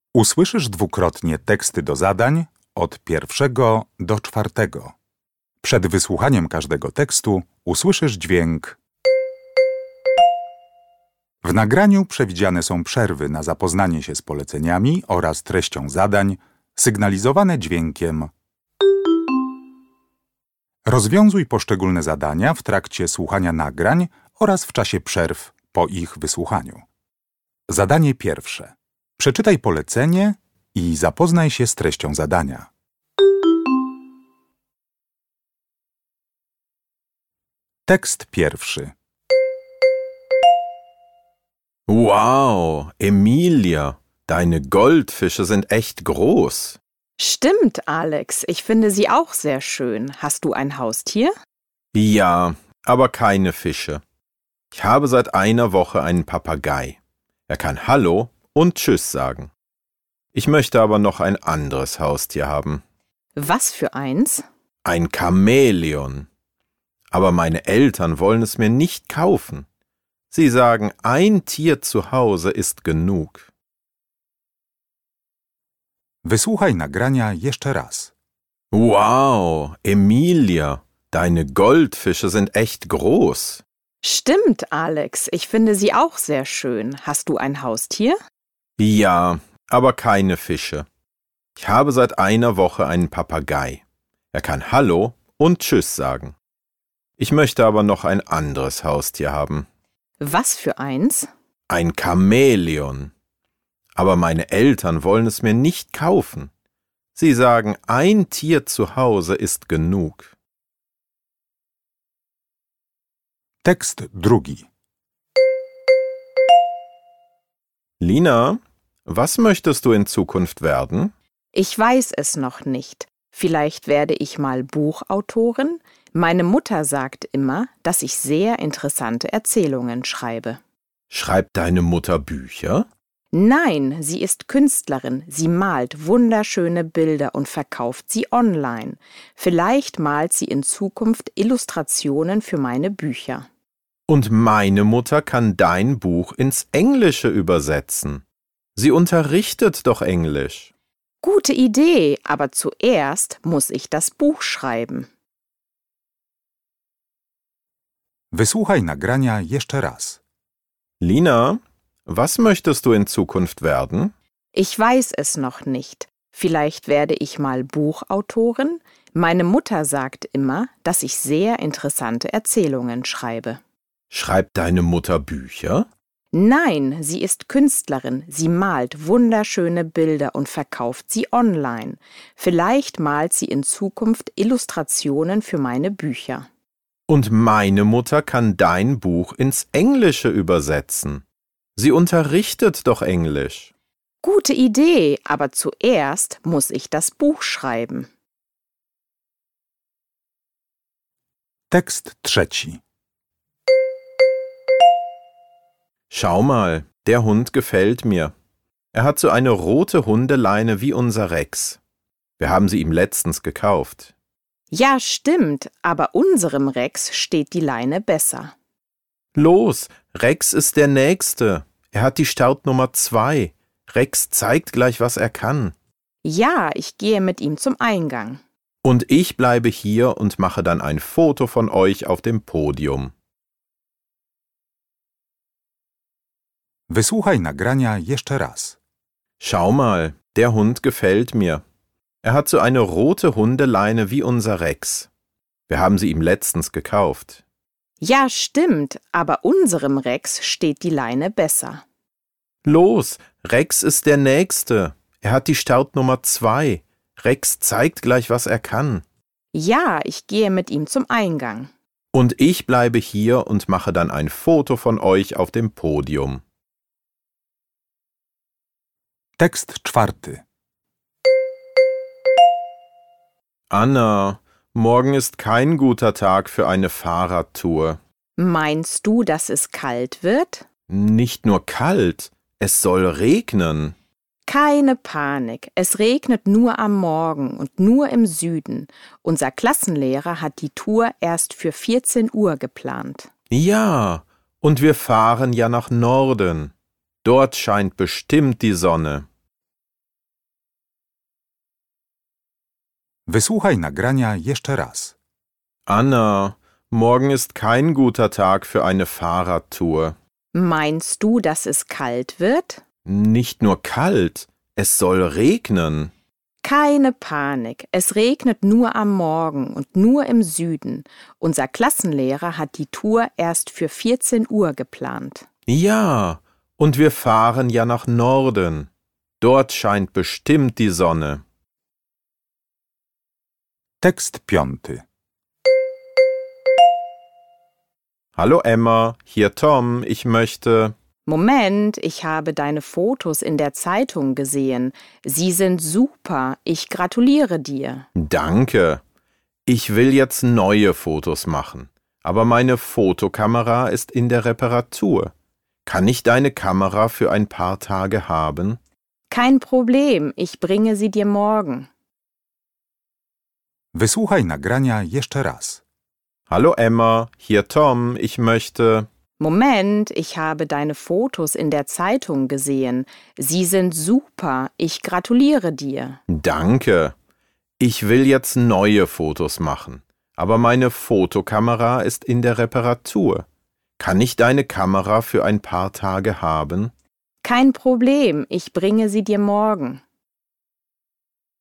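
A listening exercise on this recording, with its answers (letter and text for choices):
Uruchamiając odtwarzacz z oryginalnym nagraniem CKE usłyszysz dwukrotnie pięć tekstów. W zadaniach 1.1.–1.5., na podstawie informacji zawartych w nagraniu, z podanych odpowiedzi wybierz właściwą. Zaznacz jedną z liter: A, B albo C.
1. Worüber sprechen die Personen?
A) Über den Stundenplan.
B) Über das Wetter.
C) Über ein Turnier.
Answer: B) Über das Wetter.

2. Warum ruft der Junge Emma an?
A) Er bittet sie um ihren Fotoapparat.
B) Er gibt ihr Tipps zum Fotografieren.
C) Er lädt sie zu einer Fotoausstellung ein.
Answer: A) Er bittet sie um ihren Fotoapparat.

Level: egzamin ósmoklasisty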